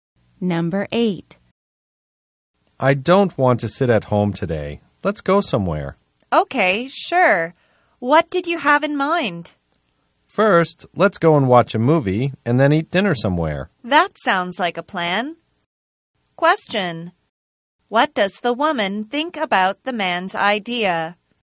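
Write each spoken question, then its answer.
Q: What does the woman think about the man's idea?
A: She thinks it sounds like a good plan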